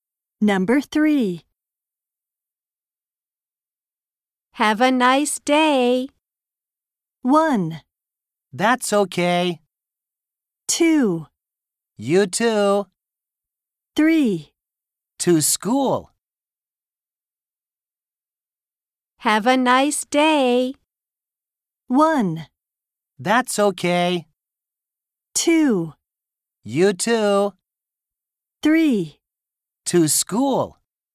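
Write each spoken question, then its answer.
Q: Have a nice day.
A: 2: You too.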